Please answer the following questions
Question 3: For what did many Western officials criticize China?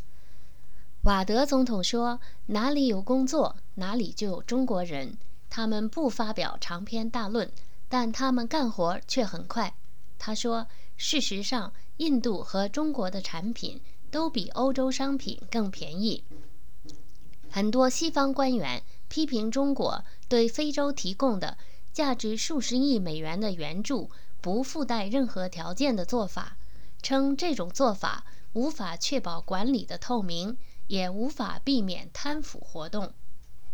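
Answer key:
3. For giving Africa billions of dollars in aid with no conditions attached, which cannot ensure transparent governance or prevent corruption

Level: M.Phil Year 2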